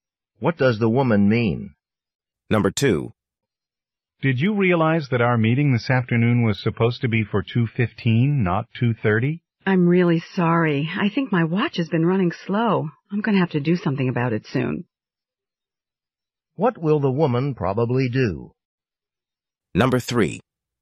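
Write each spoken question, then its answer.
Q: What will the woman probably do?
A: Get her watch fixed or replaced.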